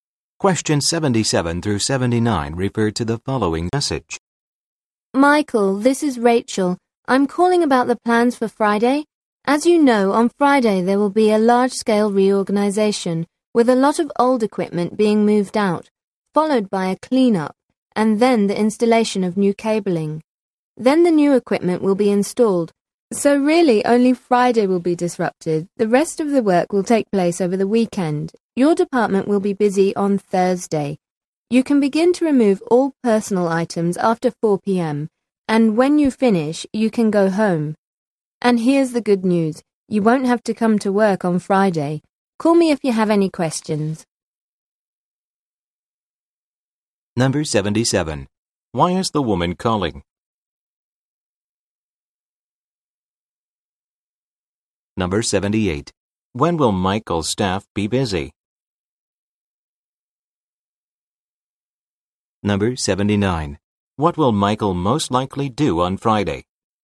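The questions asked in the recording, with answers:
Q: Why is the woman calling?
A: To explain the plans for Friday

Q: When will Michael's staff be busy?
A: On Thursday

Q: What will Michael most likely do on Friday?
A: Not go to work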